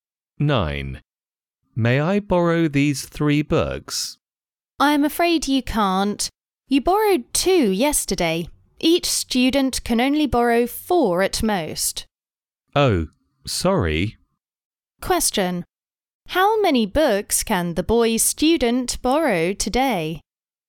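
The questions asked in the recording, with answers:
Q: How many books can the boy student borrow today?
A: Two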